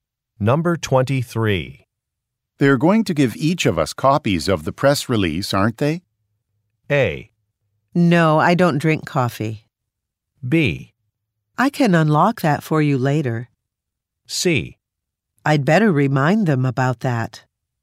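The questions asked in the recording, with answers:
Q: They're going to give each of us copies of the press release, aren't they?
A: C: I'd better remind them about that.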